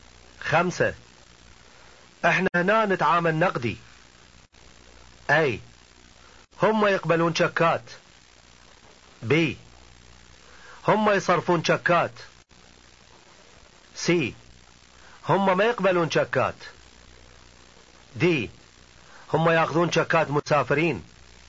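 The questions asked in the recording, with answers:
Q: خمسة احنا هنا نتعامل نقدي.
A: C: هم ما يقبلون شكات.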